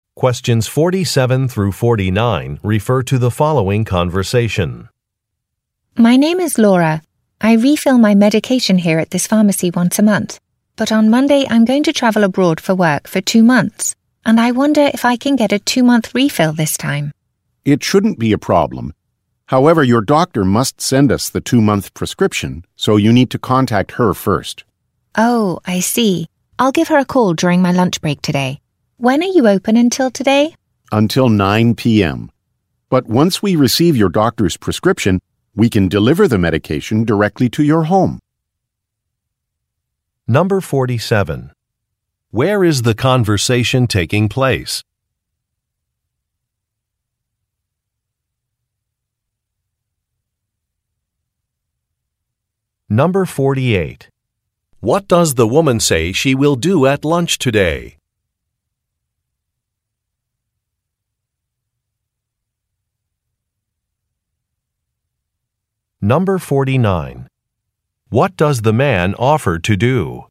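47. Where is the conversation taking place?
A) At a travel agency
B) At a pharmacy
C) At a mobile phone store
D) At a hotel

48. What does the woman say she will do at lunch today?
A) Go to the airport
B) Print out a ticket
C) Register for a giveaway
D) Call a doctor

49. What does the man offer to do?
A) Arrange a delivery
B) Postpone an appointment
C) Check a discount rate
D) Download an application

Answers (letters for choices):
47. B
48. D
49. A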